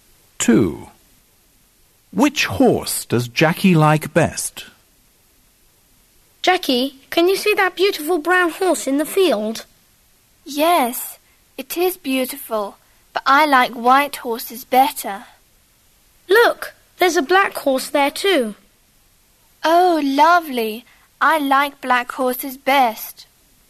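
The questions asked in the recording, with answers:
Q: Which horse does Jackie like best?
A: The black horse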